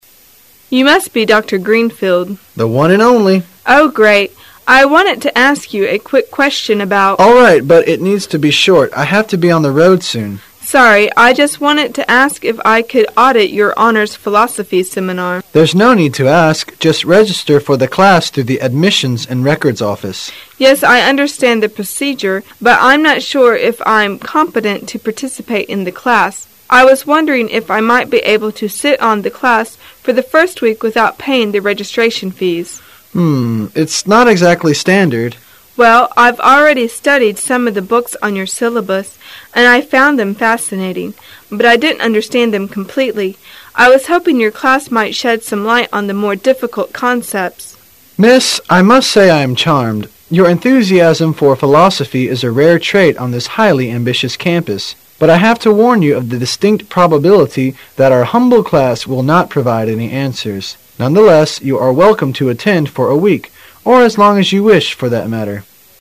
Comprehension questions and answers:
Why did the professor consent to the woman's request?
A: He believes she is dedicated to philosophy.

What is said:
[解析] 1-3 W: You must be Dr. Greenfield? M: The one and only. W: Oh, great, I wanted to ask you a quick question about... M: All fight, but it needs to be short. I have to be on the road soon. W: Sorry, I just wanted to ask if I could audit your honors philosophy seminar. M: There's no need to ask. Just register for the class through the Admissions and Records office. W: Yes, I understand the procedure, but I' m not sure if I' m competent to participate in the class. I was wondering if I might be able to sit-in on the class for the first week without paying the registration fees? M: Hmm, it's not exactly standard. W: Well, I' ve already studied some of the books on your syllabus and I found them fascinating, but I didn't understand them completely. I was hoping your class might shed some light on the more difficult concepts. M: Miss, I must say I am charmed. You' re enthusiasm for philosophy is a rare trait on this highly ambitious campus, but I have to warn you of the distinct probability that our humble class will not provide any answers. Nonetheless, you are welcome to attend for a week, or as long as you wish for that matter.